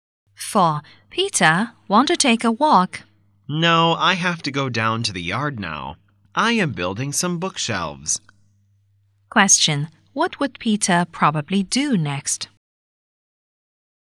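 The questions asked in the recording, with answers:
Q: What would Peter probably do next?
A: Build bookshelves in the yard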